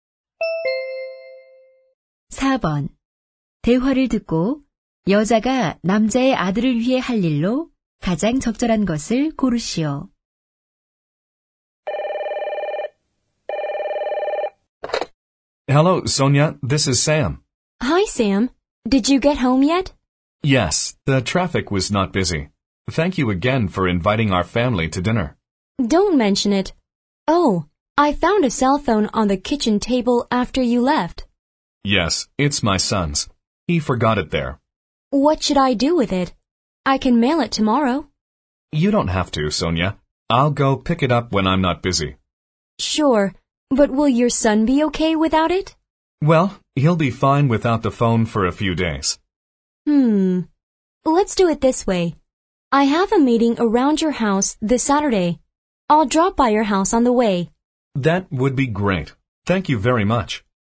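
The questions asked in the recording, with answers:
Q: 대화를 듣고 여자가 남자의 아들을 위해 할 일로 가장 적절한 것을 고르시오.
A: 토요일에 남자의 집에 들러 휴대폰을 가져다주기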